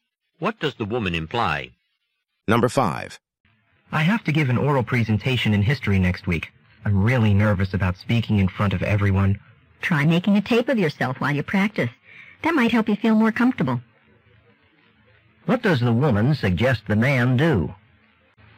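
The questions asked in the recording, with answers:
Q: What does the woman suggest the man do?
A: Tape himself while he practices his presentation.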